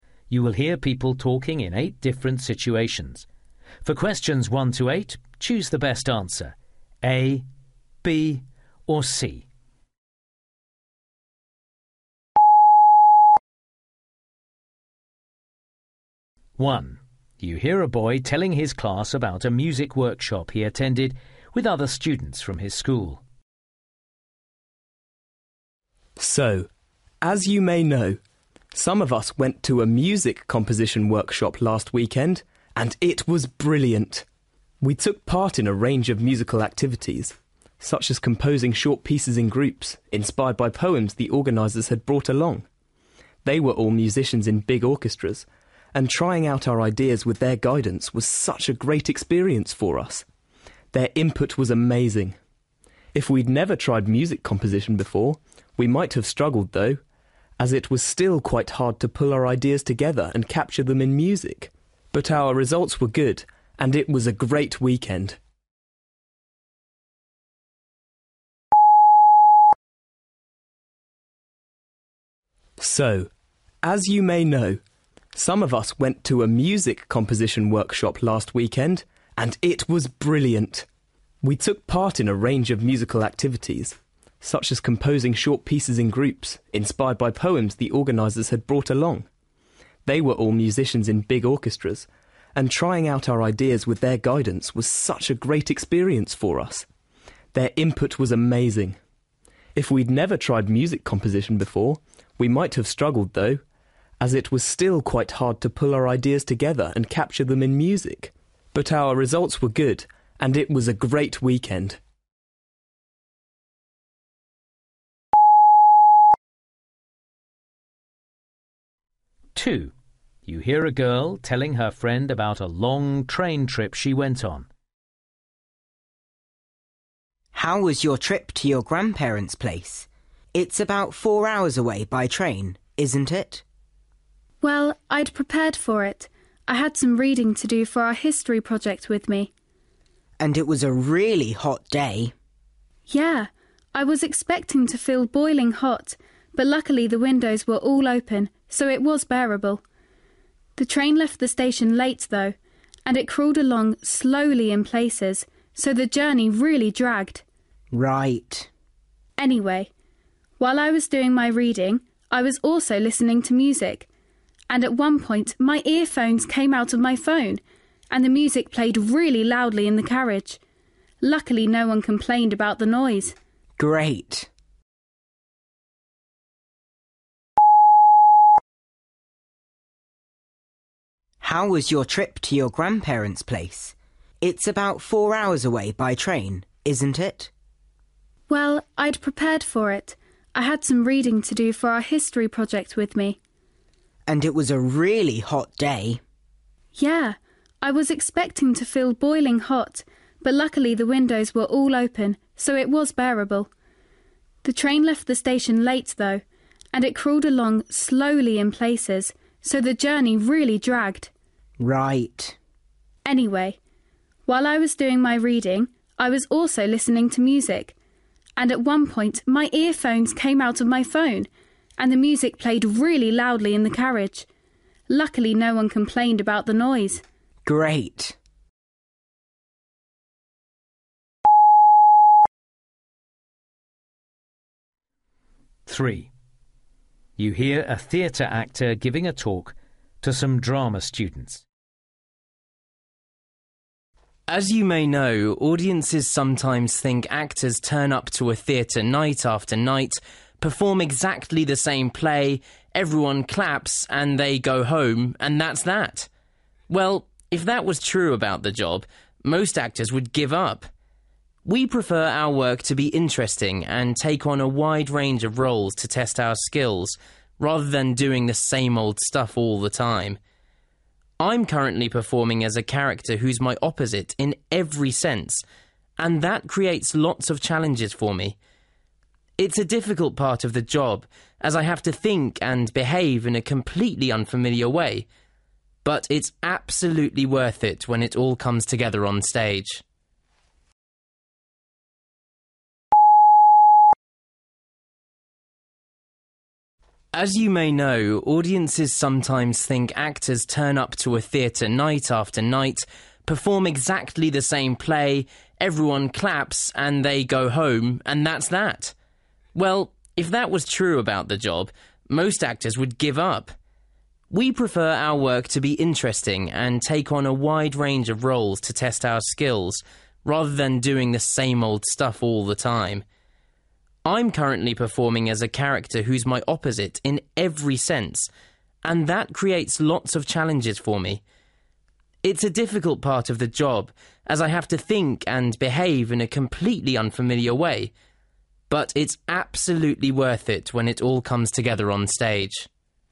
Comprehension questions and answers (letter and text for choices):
You will hear people talking in eight different situations. For questions 1-8, choose the best answer (A, B or C).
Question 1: You hear a boy telling his class about a music workshop he attended with other students from his school. What does he say about the workshop?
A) It inspired them to attempt things they hadn't tried before.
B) It confirmed their confidence in their ability to compose.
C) It gave them a great opportunity to work with professional musicians.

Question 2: You hear a girl telling her friend about a long train trip she went on. What does she say about it?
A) It took longer than she'd expected.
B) It felt more uncomfortable than usual.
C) It was too noisy for her to do her homework.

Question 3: You hear a theatre actor giving a talk to some drama students. What does he emphasise about his work?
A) the advantages of always being asked to play the same kind of character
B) the difficulties of playing someone who is very different from him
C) the energy required to repeat the same role over many performances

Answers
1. C) It gave them a great opportunity to work with professional musicians.
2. A) It took longer than she'd expected.
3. B) the difficulties of playing someone who is very different from him

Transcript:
1
So, as you may know, some of us went to a music composition workshop last weekend – and it was brilliant! We took part in a range of musical activities, such as composing short pieces in groups inspired by poems the organisers had brought along. They were all musicians in big orchestras, and trying out our ideas with their guidance was such a great experience for us. Their input was amazing. If we'd never tried music composition before, we might have struggled though, as it was still quite hard to pull our ideas together and capture them in music. But our results were good – and it was a great weekend!
Kemal: How was your trip to your grandparents' place? It's about four hours away by train, isn't it?
Lucy: Well, I'd prepared for it – I had some reading to do for our history project with me!
Kemal: And it was a really hot day ...
Lucy: Yeah, I was expecting to feel boiling hot, but luckily the windows were all open, so it was bearable. The train left the station late, though, and it crawled along slowly in places, so the journey really dragged.
Kemal: Right.
Lucy: Anyway, while I was doing my reading I was also listening to music, and at one point my earphones came out of my phone and the music played really loudly in the carriage! Luckily, no-one complained about the noise!
Kemal: Great!
As you may know, audiences sometimes think actors turn up to a theatre night after night, perform exactly the same play, everyone claps and they go home, and that's that! Well, if that was true about the job, most actors would give up! We prefer our work to be interesting and take on a wide range of roles to test our skills, rather than doing the same old stuff all the time. I'm currently performing as a character who's my opposite in every sense and that creates lots of challenges for me. It's a difficult part of the job as I have to think and behave in a completely unfamiliar way. But it's absolutely worth it when it all comes together on stage!